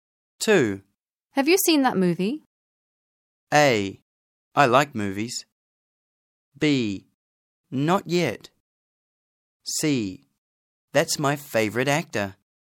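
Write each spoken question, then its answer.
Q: Have you seen that movie?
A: B: Not yet.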